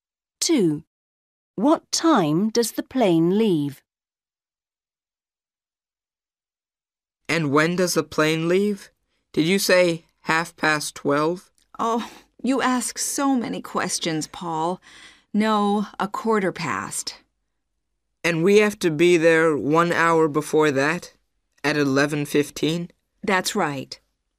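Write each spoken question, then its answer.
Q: What time does the plane leave?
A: 12:15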